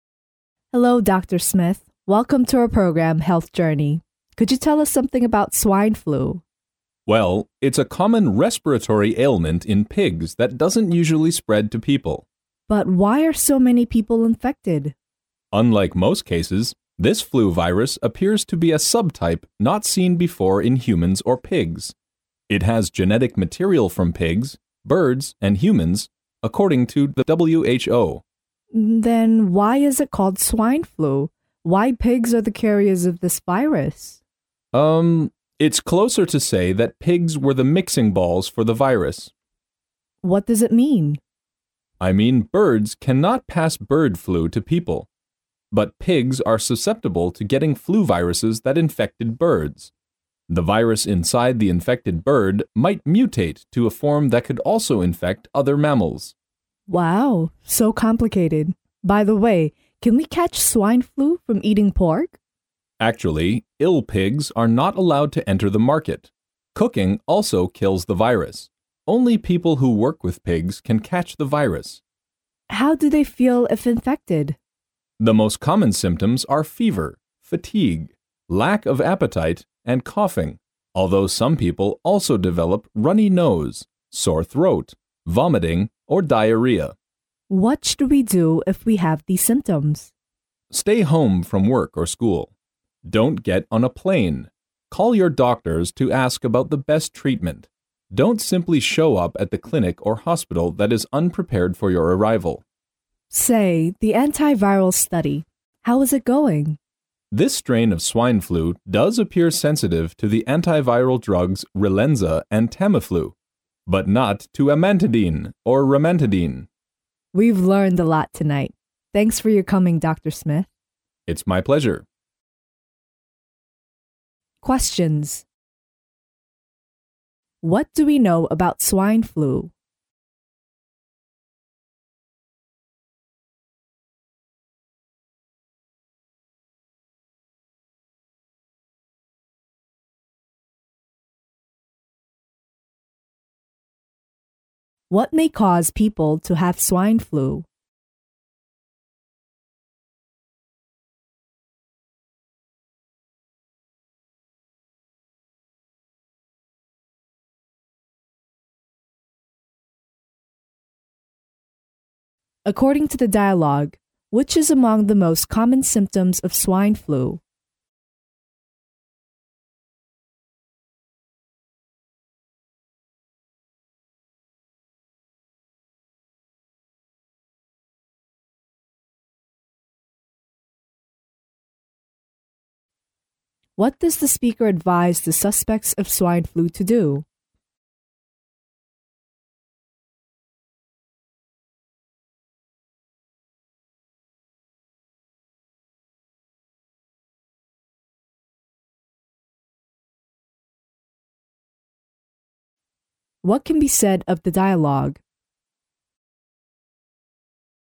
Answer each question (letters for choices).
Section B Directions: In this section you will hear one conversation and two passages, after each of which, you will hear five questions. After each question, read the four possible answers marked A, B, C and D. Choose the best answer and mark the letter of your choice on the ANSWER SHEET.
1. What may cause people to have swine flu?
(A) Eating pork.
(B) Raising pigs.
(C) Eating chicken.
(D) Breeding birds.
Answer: B

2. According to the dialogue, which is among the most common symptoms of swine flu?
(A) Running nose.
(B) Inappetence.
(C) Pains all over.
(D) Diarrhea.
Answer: B

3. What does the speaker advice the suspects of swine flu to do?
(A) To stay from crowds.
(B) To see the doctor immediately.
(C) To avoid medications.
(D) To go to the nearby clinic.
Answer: A

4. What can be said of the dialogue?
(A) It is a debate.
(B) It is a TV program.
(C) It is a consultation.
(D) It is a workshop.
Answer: B

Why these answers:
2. 细节题。题意:根据对话,下列哪一个是猪流感最常见的症状?根据对话可知,常见的症状有发热、疲劳、食欲不振和咳嗽。(The most common symptoms are fever, fatigue, lack of appetite and coughing. )因而答案为B。
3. 细节题。题意:说话人建议猪流感疑似患者做什么?根据对话可知,如果出现上述症状应该在家隔离,打电话给医生,但不要去医院就诊。(Stay home from work and school. To call your doctors to ask about the best treatment. Don't simply show up at the clinic or hospital that is unprepared for your arrival. )因而答案为A。
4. 细节题。题意:这段对话是什么?根据对话可知,这是一档健康生活的节目(Welcome to our program "Health Journey". ),因而答案为B。

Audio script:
[听力原文] W: Hello doctor Smith, welcome to our program "Health Journey". Could you tell us something about swine flu. M: Well, it's a common respiratory ailment in pigs that doesn't usually spread to people. W: But why are so many people infected? M: Unlike most cases, this flu virus appears to be a sub-type not seen before in humans or pigs. It has genetic material from pigs, birds and humans, according to WHO. W: Then why is it called swine flu? Why pigs are the carriers of this virus? It's closer to say that pigs were the mixing balls for this virus. W: What does it mean? M: I mean birds cannot pass bird flu to people. But pigs are susceptible to getting flu viruses that infected birds. The virus inside the infected pig might mutate to a form that could also infect other mammals. W: Wow, so complicated. By the way, can we catch swine flu from eating pork? M: Actually, ill pigs are not allowed to enter the market. Cooking also kills the virus. Only people who work with pigs can catch the virus. W: How do they feel if infected? M: The most common symptoms are fever, fatigue, lack of appetite and coughing, although some people also develop runny nose, sore throat, vomiting or diarrhea. W: What should we do if we have these symptoms? M: Stay home from work or school. Don't get on a place. Call your doctors to ask about the best treatment. Don't simply show up at the clinic or hospital that is unprepared for your arrival. W: Say, the antiviral study. How is it going? M: This strain of swine flu does appear sensitive to the antiviral drugs Relenza and Tamiflu, but not to Amantadine and Remantadine. W: We've learned a lot tonight. Thanks for your coming, doctor Smith. M: It's my pleasure.
What do we know about swine flu?